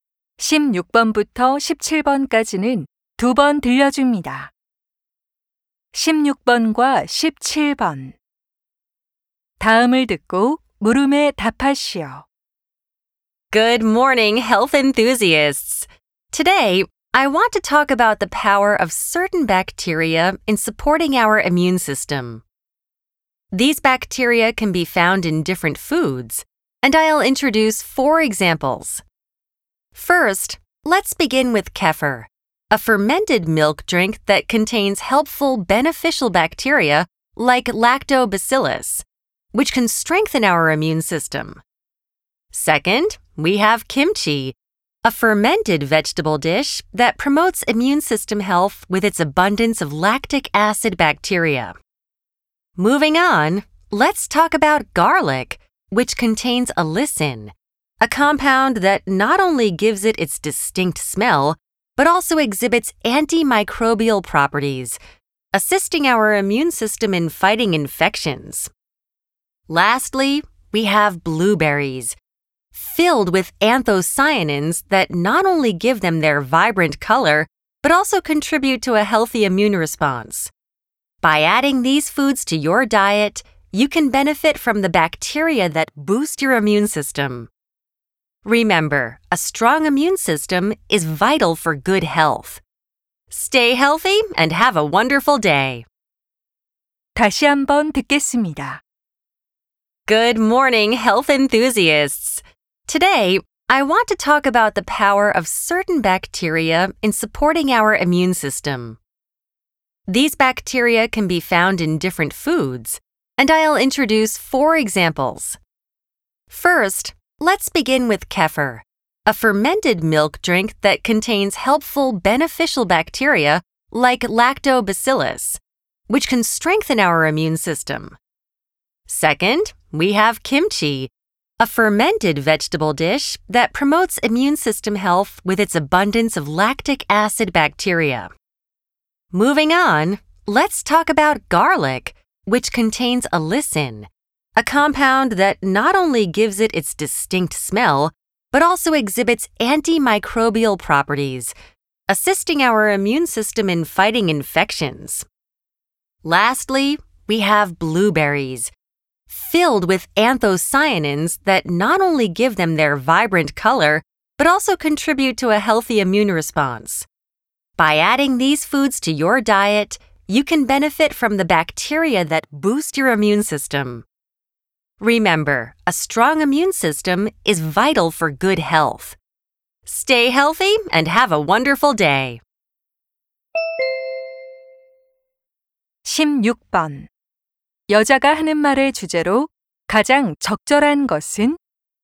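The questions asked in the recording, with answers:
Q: 여자가 하는 말을 주제로 가장 적절한 것은?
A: 면역 체계를 강화하는 음식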